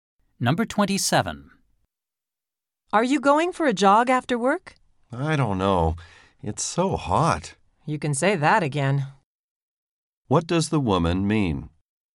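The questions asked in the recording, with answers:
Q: What does the woman mean?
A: She agrees it is very hot.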